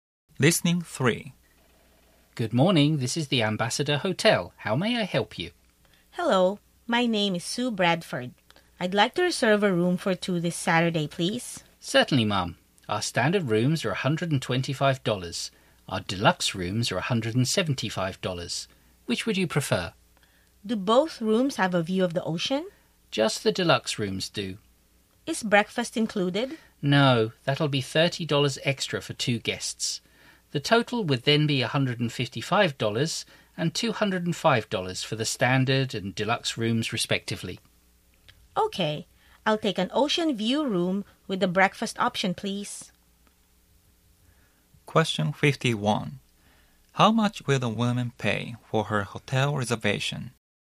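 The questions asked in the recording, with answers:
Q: How much will the woman pay for her hotel reservation?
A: $205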